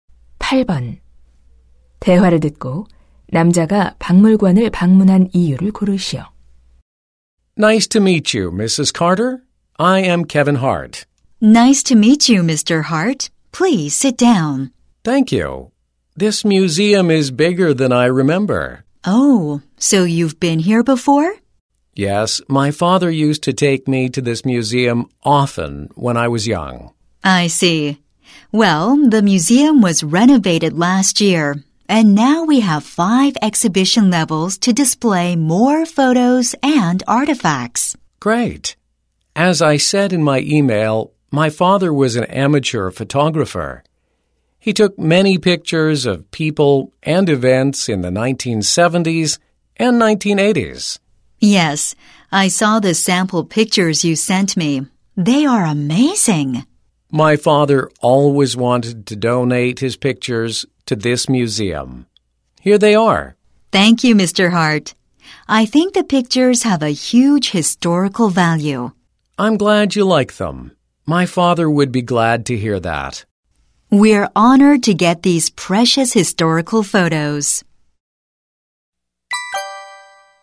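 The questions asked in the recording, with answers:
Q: 대화를 듣고 남자가 박물관을 방문한 이유를 고르시오.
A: 아버지의 사진을 기증하려고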